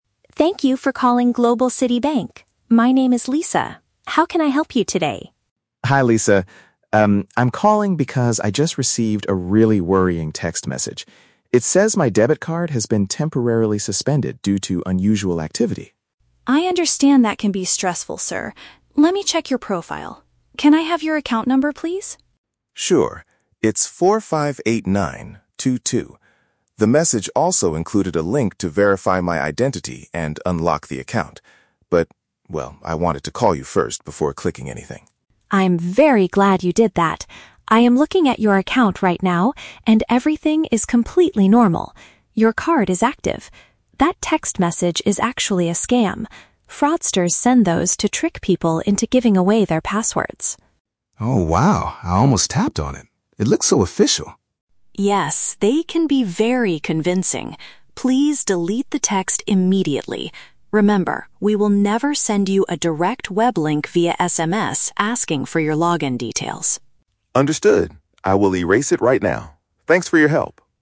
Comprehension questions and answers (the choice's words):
Listen to the phone conversation between a customer and a bank representative, and choose the correct answer (A, B, or C) for each question.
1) Why is the customer contacting the bank?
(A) He wants to report an unusual purchase on his credit card.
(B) He is concerned about a recent alert he got on his phone.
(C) He forgot the password needed to log into his account.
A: He is concerned about a recent alert he got on his phone.

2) What did the text message ask the man to do?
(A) Call the bank's customer service number immediately.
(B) Visit a local bank branch to confirm his identity in person.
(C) Follow a digital URL to fix the problem with his card.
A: Follow a digital URL to fix the problem with his card.

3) What does the agent confirm about the man's situation?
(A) His financial profile is perfectly safe and functioning.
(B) The bank sent the message by mistake and will fix it.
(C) He must change his login details because of the scammers.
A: His financial profile is perfectly safe and functioning.

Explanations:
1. The customer states he is calling because he received a "really worrying text message." Option B uses the synonyms "concerned" for worrying and "recent alert on his phone" for text message. Why the traps are wrong: Option A is a trap because the audio mentions "unusual activity," but the customer is not reporting a purchase; he is asking about a message. Option C is a plausible banking issue, but he never mentions forgetting his password.
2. The man says the message included a "link to verify my identity and unlock the account." Option C uses the synonym phrase "Follow a digital URL" to paraphrase clicking a link. Why the traps are wrong: Option A is a trap; the man does call customer service, but the text message did not tell him to do this—he decided to do it himself. Option B is plausible, but the message did not ask him to visit the bank in person.
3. The agent checks his profile and says, "everything is completely normal. Your card is active." Option A uses the synonym phrase "perfectly safe and functioning" to express this. Why the traps are wrong: Option B is a trap because the agent explicitly states the message is a "scam" sent by "fraudsters," not a mistake by the bank. Option C is a logical security step, but the agent only tells him to delete the text, not to change his password (since he never clicked the link).

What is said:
Agent: Thank you for calling Global City Bank. My name is Lisa. How can I help you today?
Customer: Hi Lisa. Um, I'm calling because I just received a really worrying text message. It says my debit card has been temporarily suspended due to unusual activity.
Agent: I understand that can be stressful, sir. Let me check your profile. Can I have your account number, please?
The message also included a link to verify my identity and unlock the account. But, well, I wanted to call you first before clicking anything.
Agent: I'm very glad you did that. I am looking at your account right now, and everything is completely normal. Your card is active. That text message is actually a scam. Fraudsters send those to trick people into giving away their passwords.
Customer: Oh, wow. I almost tapped on it! It looked so official.
Agent: Yes, they can be very convincing. Please delete the text immediately. Remember, we will never send you a direct web link via SMS asking for your login details.